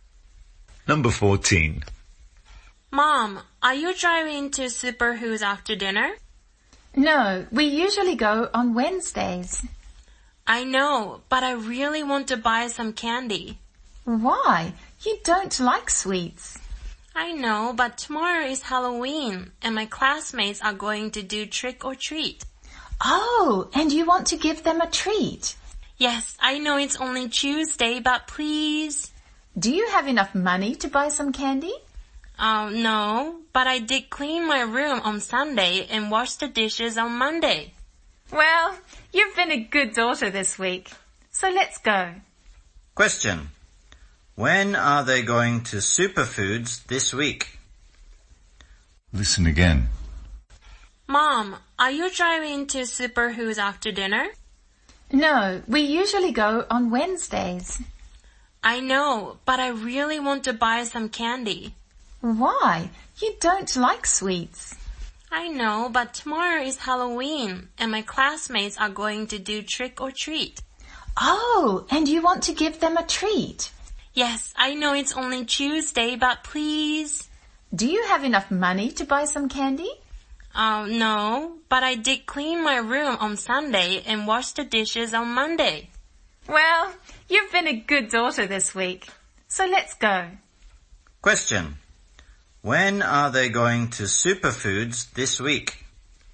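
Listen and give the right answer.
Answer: Tuesday, after dinner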